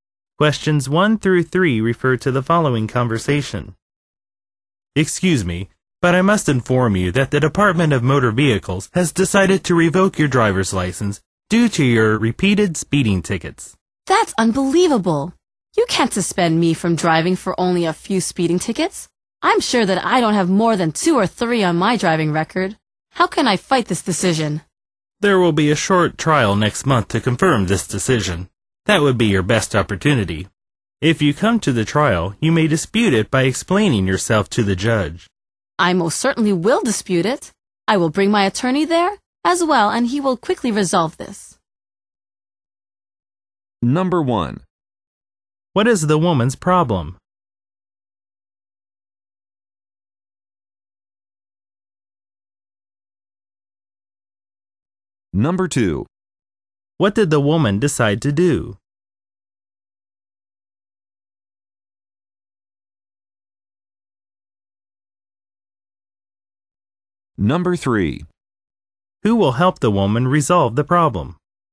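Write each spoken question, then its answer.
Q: What is the woman's problem?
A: Her driver's license is being revoked for repeated speeding tickets

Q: What did the woman decide to do?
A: Dispute the decision at the trial

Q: Who will help the woman resolve the problem?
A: Her attorney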